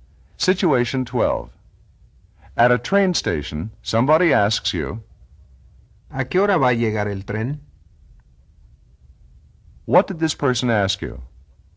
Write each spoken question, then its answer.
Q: What did this person ask you?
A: He asked, At what time is the train going to arrive?